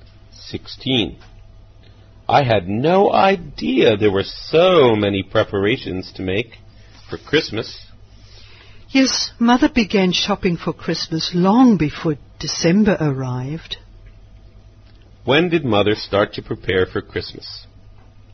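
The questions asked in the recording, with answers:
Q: When did Mother start to prepare for Christmas?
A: Long before December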